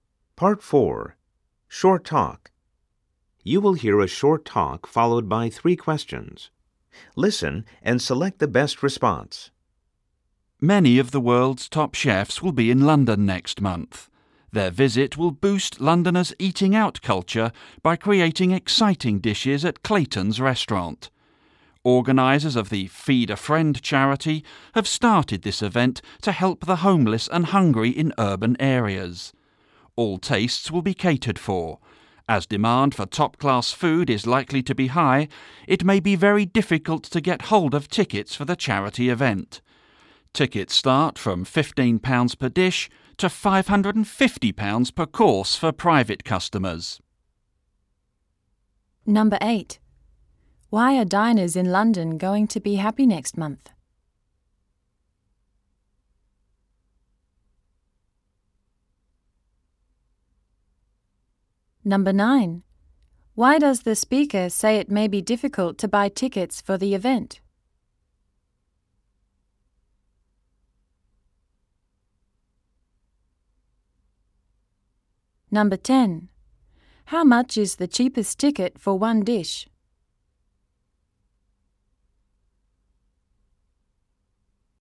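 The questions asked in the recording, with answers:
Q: Why are diners in London going to be happy next month?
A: Many of the world's top chefs will be in London creating exciting dishes

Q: Why does the speaker say it may be difficult to buy tickets for the event?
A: Demand for top-class food is likely to be high

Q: How much is the cheapest ticket for one dish?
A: £15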